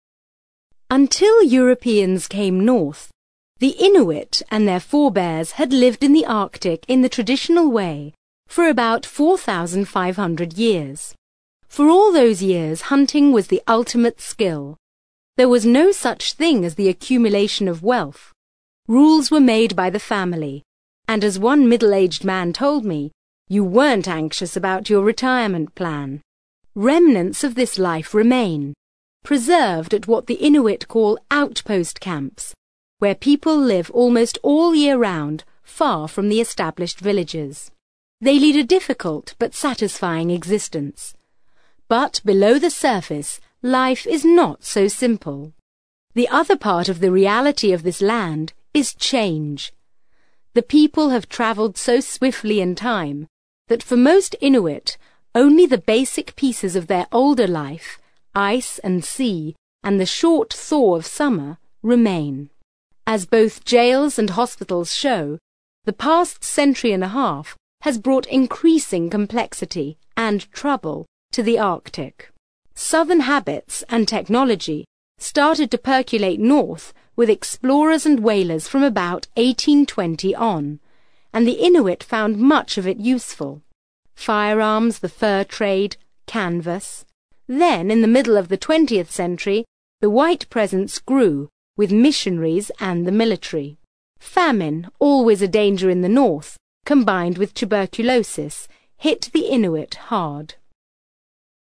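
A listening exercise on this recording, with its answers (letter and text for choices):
You are going to hear a short extract from a radio documentary. For questions 7-8, choose the answer (A, B or C) which fits best according to what you hear.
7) The speaker says that for 4,500 years the Inuit...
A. had an unchanged lifestyle.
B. made rules for the family.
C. saved anxiously for their retirement.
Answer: A. had an unchanged lifestyle.

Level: CPE Proficiency English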